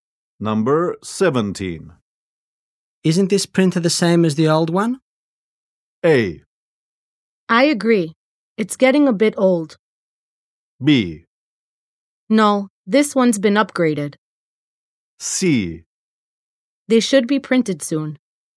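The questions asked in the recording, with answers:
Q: Isn't this printer the same as the old one?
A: B: No, this one's been upgraded.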